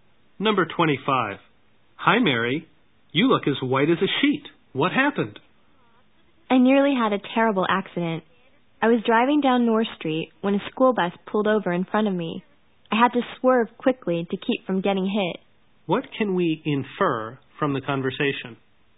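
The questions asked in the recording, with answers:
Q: What can we infer from the conversation?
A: Mary nearly had a car accident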